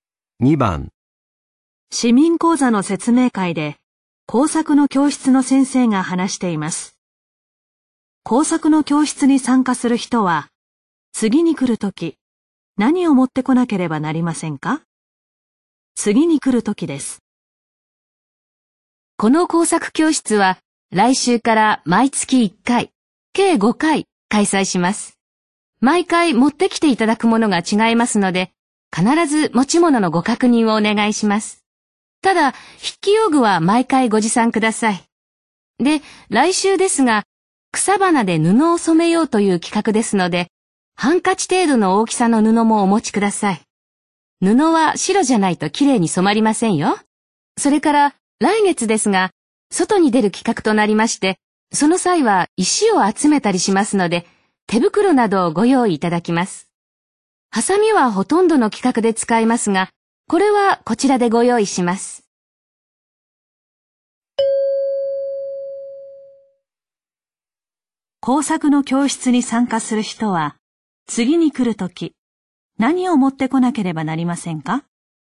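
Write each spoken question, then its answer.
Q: 工作の教室に参加する人は、次に来るとき、何を持ってこなければなりませんか?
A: 筆記用具と白い布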